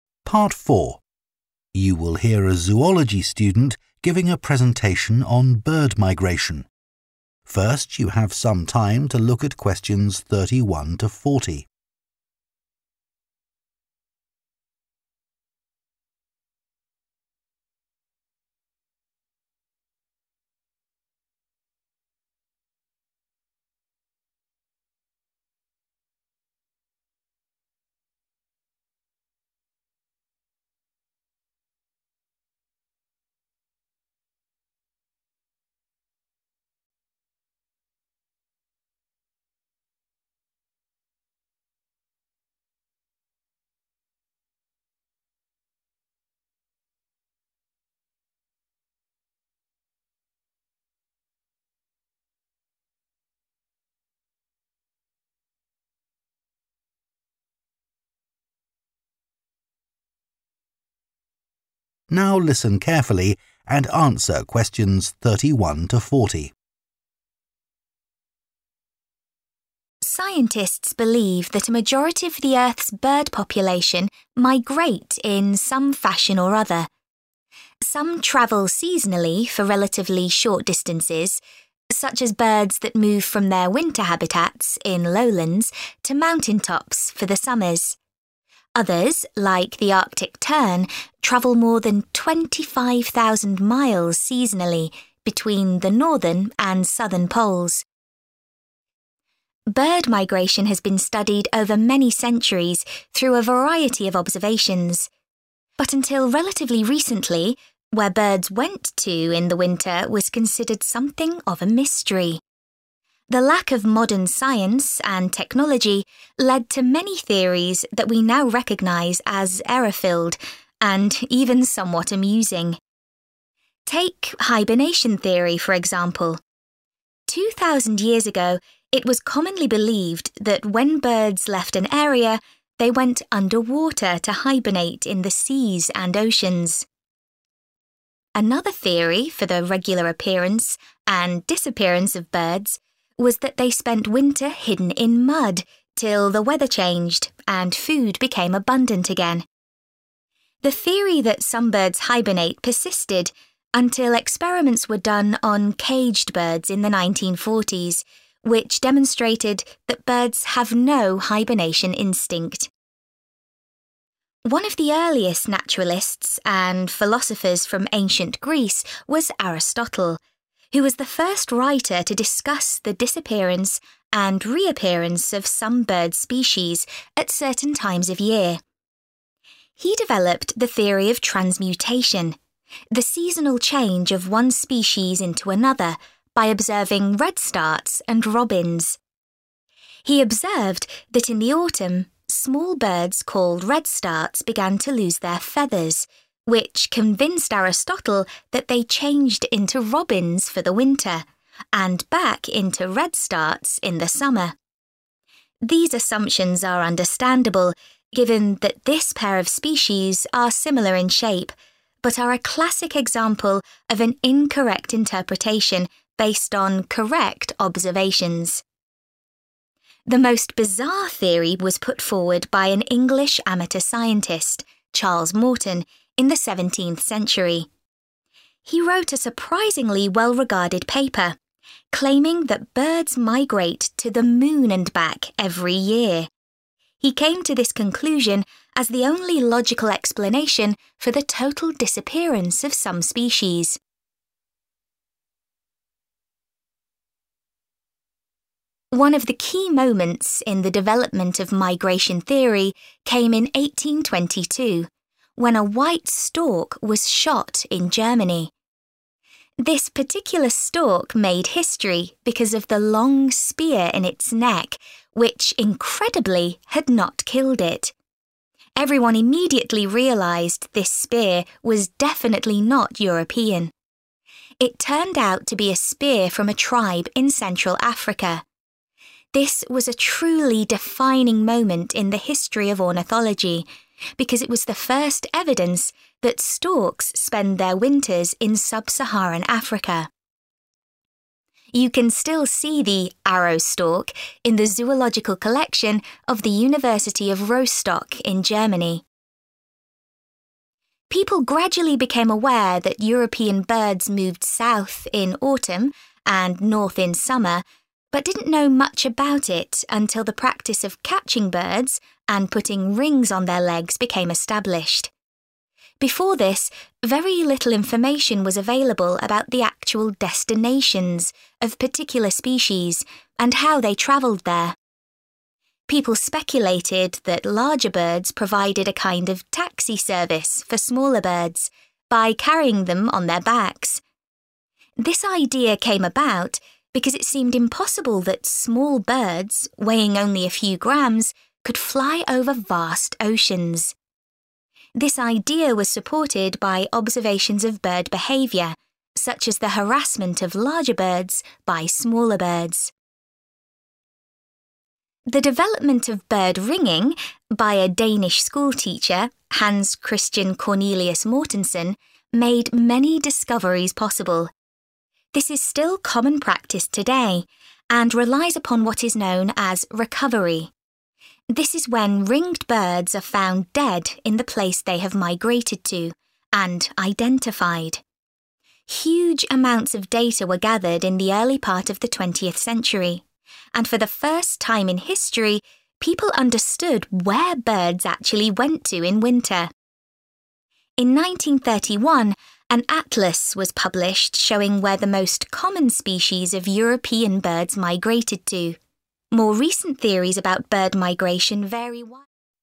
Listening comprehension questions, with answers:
Complete the notes below. Write ONE WORD ONLY for each answer.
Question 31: It was believed that birds hibernated underwater or buried themselves in 31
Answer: mud

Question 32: In autumn he observed that redstarts experience the loss of 32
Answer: feathers

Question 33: Aristotle's assumptions were logical because the two species of birds had a similar 33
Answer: shape

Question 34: Charles Morton popularised the idea that birds fly to the 34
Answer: moon

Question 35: In 1822, a stork was killed in Germany which had an African spear in its 35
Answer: neck

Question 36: Previously there had been no 36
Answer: evidence

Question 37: Little was known about the 37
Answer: destinations

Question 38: It was thought large birds carried small birds on some journeys because they were considered incapable of travelling across huge 38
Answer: oceans

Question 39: Ringing depended on what is called the 39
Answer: recovery

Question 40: In 1931, the first 40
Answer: atlas